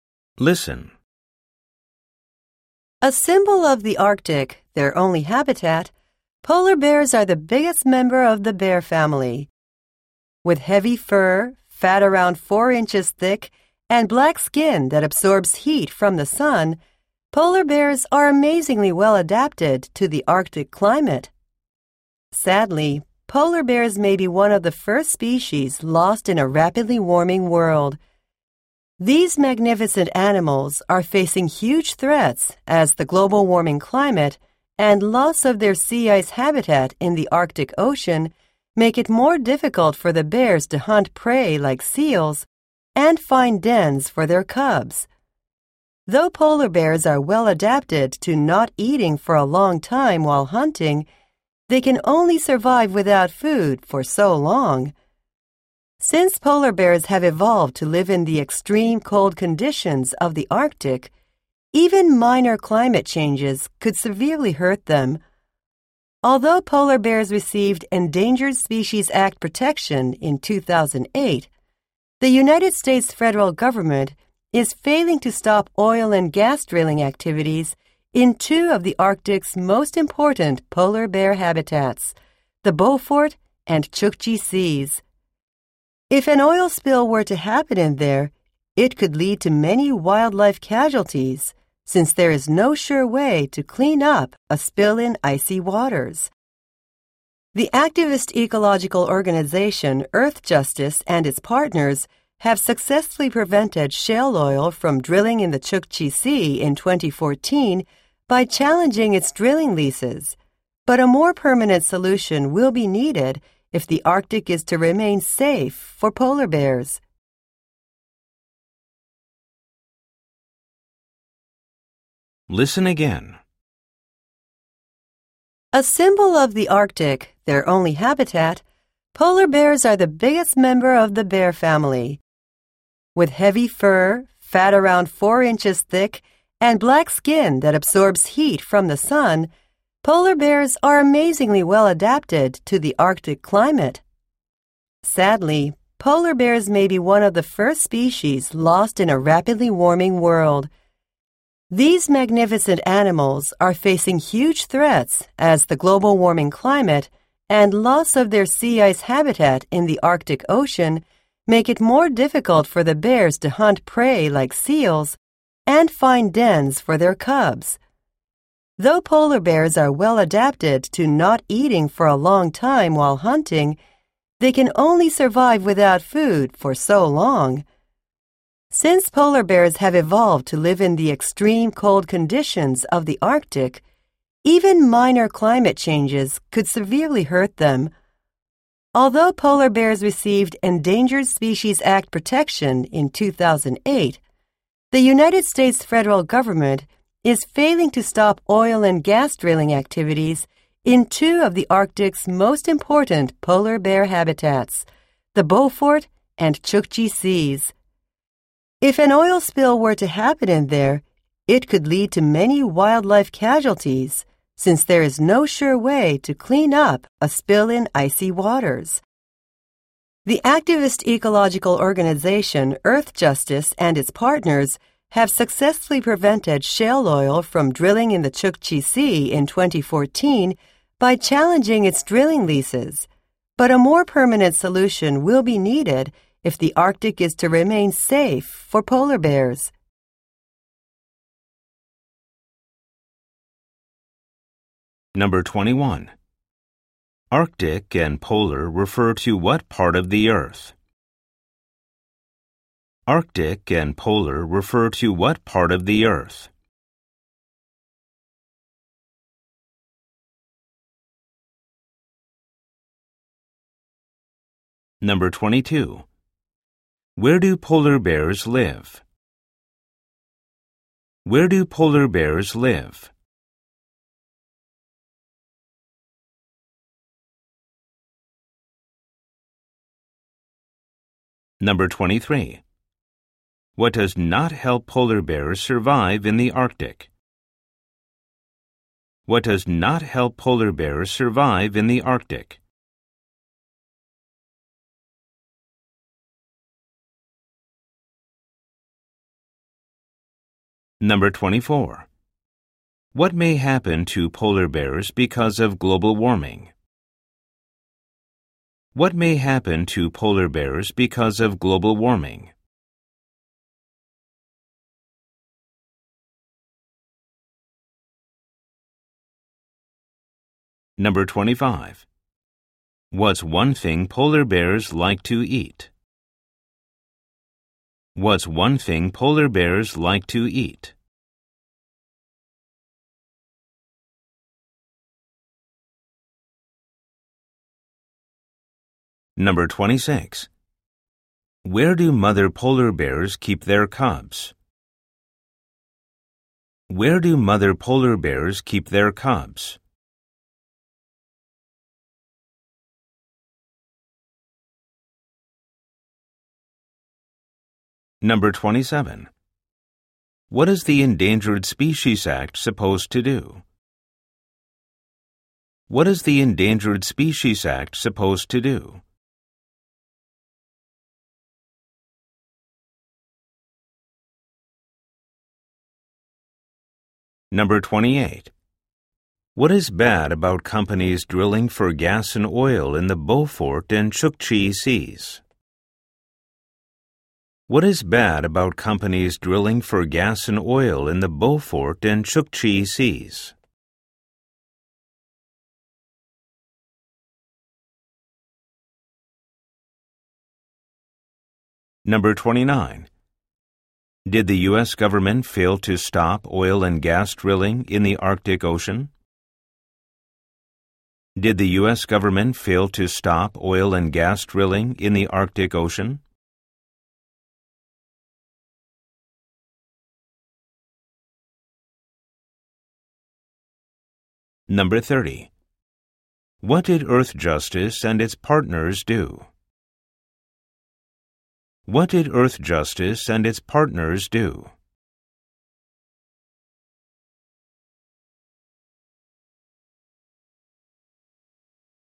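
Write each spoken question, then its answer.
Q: Where do polar bears live?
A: In the Arctic

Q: What may happen to polar bears because of global warming?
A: They may be one of the first species lost

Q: What's one thing polar bears like to eat?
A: Seals

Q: Where do mother polar bears keep their cubs?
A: In dens

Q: What is the Endangered Species Act supposed to do?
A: Protect endangered species like polar bears

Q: What is bad about companies drilling for gas and oil in the Beaufort and Chukchi Seas?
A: An oil spill could kill a lot of wildlife, and it can't be cleaned up in icy waters

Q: Did the U.S. government fail to stop oil and gas drilling in the Arctic Ocean?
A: Yes

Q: What did Earth Justice and its partners do?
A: They stopped oil drilling in the Chukchi Sea in 2014 by challenging the drilling leases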